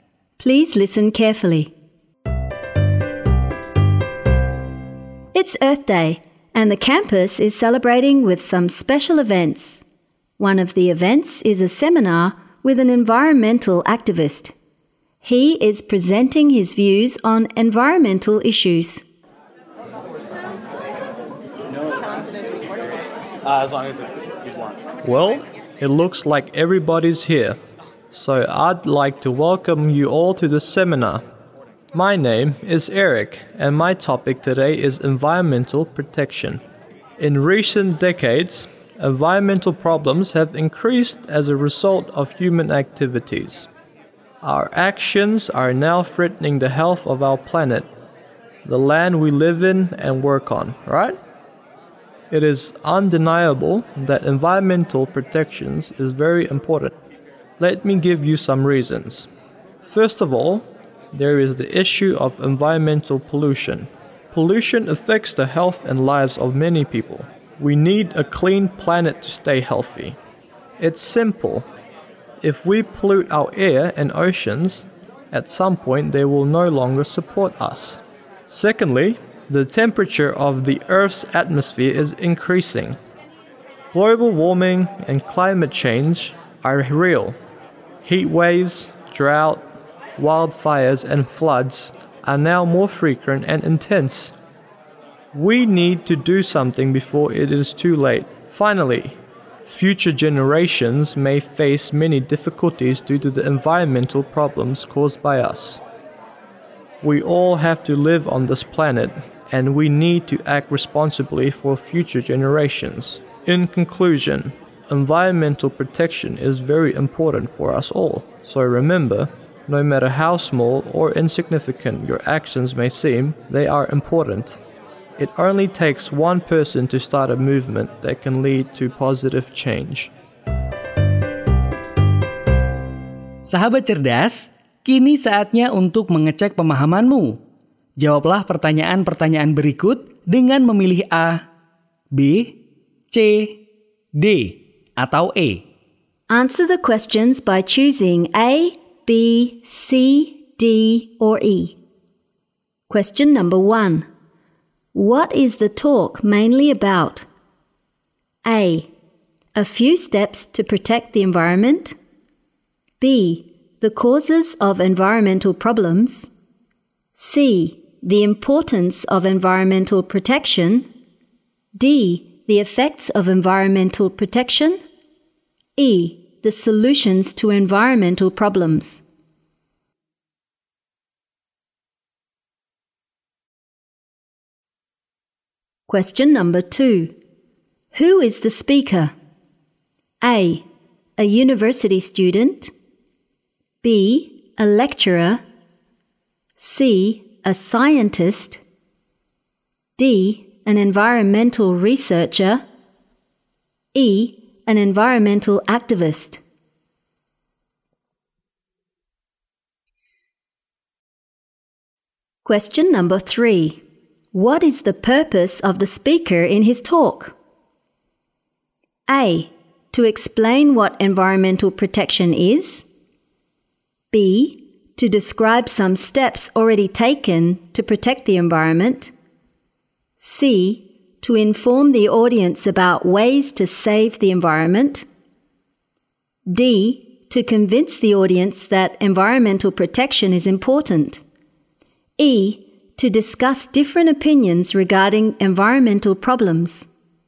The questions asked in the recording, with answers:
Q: What is the talk mainly about?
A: C. The importance of environmental protection.

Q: Who is the speaker?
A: E. An environmental activist.